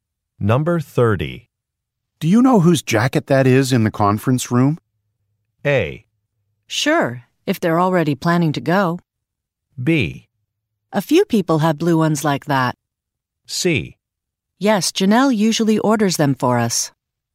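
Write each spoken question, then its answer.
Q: Do you know whose jacket that is in the conference room?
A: B: A few people have blue ones like that.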